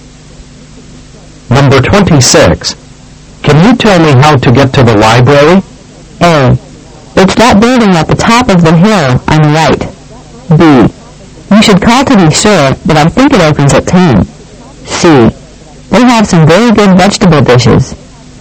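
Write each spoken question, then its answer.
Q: Can you tell me how to get to the library?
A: A: It's that building at the top of the hill on the right.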